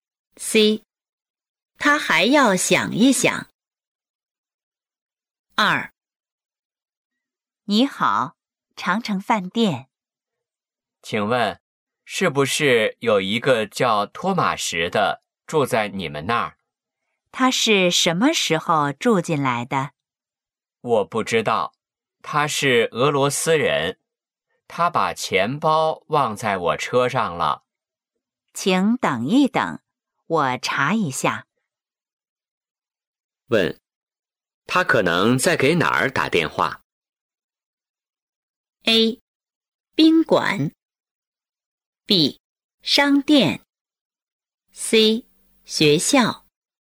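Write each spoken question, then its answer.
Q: 问,他可能在给哪儿打电话?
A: A: 宾馆。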